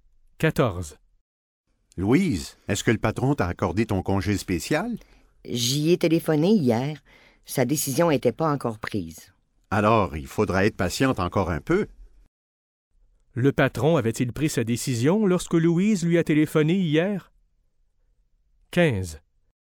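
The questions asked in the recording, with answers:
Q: Le patron avait-il pris sa décision lorsque Louise lui a téléphoné hier?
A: Non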